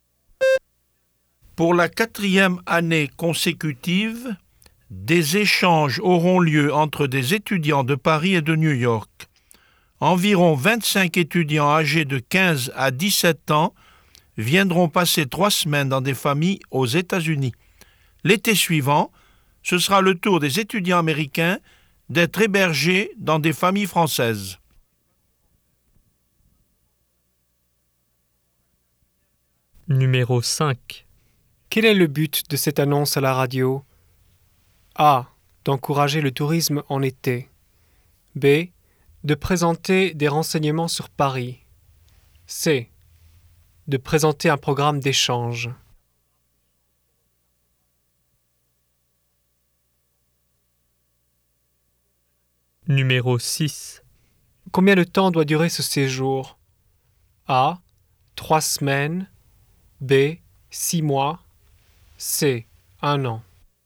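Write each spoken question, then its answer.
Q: Quel est le but de cette annonce à la radio?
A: C: De présenter un programme d'échange.

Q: Combien de temps doit durer ce séjour?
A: A: 3 semaines.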